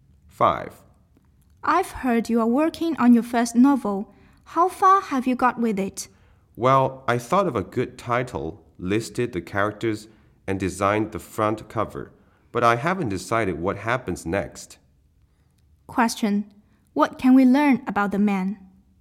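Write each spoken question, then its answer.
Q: What can we learn about the man?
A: He hasn't decided what happens next in his novel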